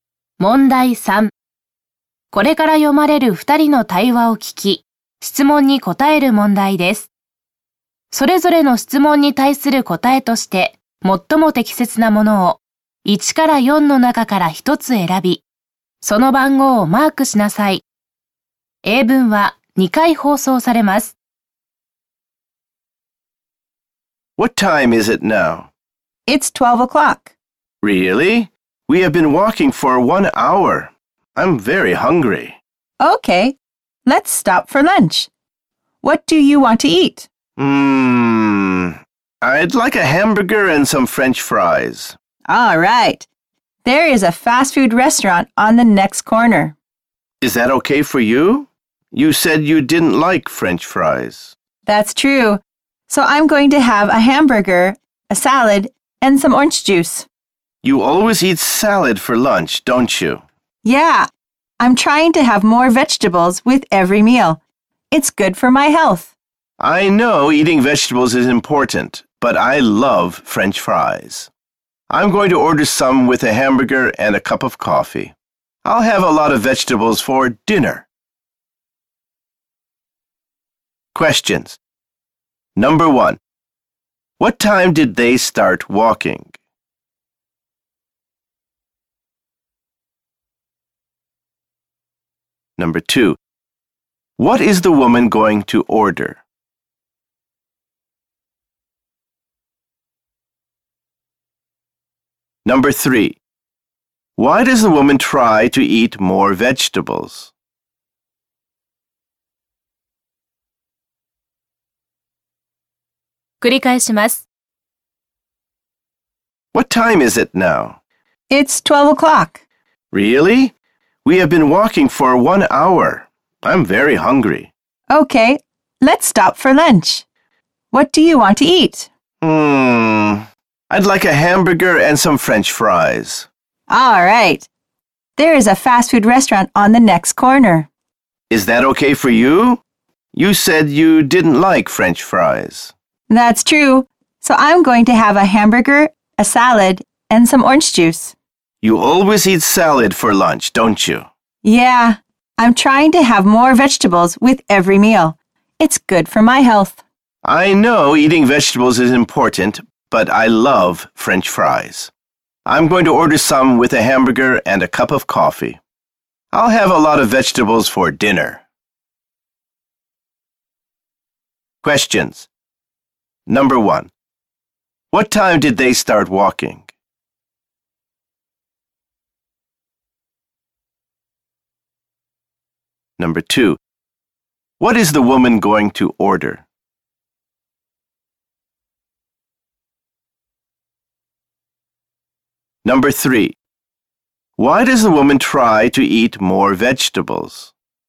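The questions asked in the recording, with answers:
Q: What time did they start walking?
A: At 11 o'clock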